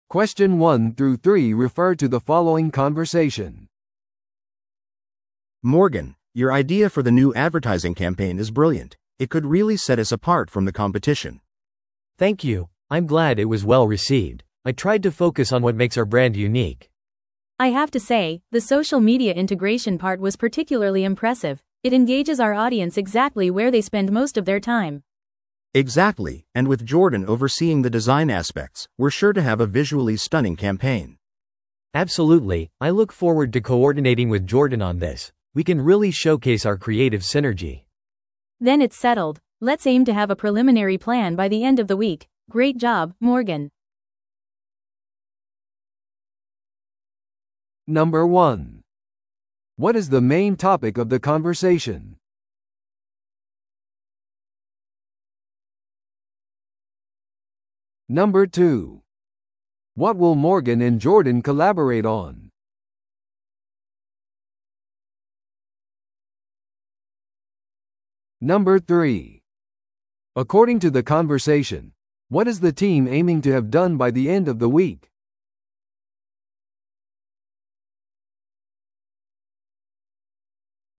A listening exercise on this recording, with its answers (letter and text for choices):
Listen to the audio below and answer the questions.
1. What is the main topic of the conversation?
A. プロジェクトの締め切りを設定する。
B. 企業の社交イベントを組織する。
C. 新しい広告戦略について話し合う。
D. チームメンバーのパフォーマンスをレビューする。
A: C. 新しい広告戦略について話し合う。

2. What will Morgan and Jordan collaborate on?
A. ブランドの独自性に関するレポートを書く。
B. キャンペーンのビジュアルデザインを作成する。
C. ソーシャルメディアプロモーションを計画する。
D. 新製品ラインを開発する。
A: B. キャンペーンのビジュアルデザインを作成する。

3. According to the conversation, what is the team aiming to have done by the end of the week?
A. 広告キャンペーンを開始する。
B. すべてのクリエイティブデザインを仕上げる。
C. 商品発売を完了させる。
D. 予備計画を立てておく。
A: D. 予備計画を立てておく。

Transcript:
A: Morgan, your idea for the new advertising campaign is brilliant. It could really set us apart from the competition.
B: Thank you! I'm glad it was well received. I tried to focus on what makes our brand unique.
C: I have to say, the social media integration part was particularly impressive. It engages our audience exactly where they spend most of their time.
A: Exactly, and with Jordan overseeing the design aspects, we're sure to have a visually stunning campaign.
B: Absolutely, I look forward to coordinating with Jordan on this. We can really showcase our creative synergy.
C: Then it's settled. Let's aim to have a preliminary plan by the end of the week. Great job, Morgan.